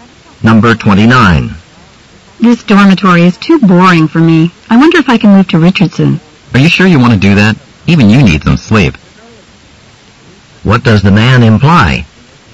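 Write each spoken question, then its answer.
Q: What does the man imply?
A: Richardson is very noisy.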